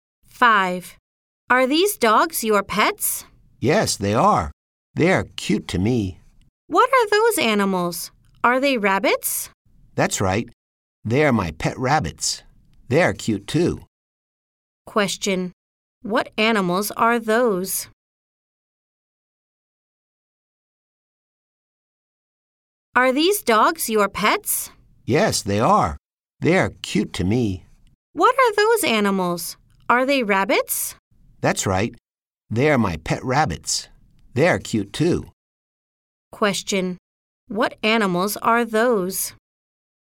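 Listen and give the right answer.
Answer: Rabbits.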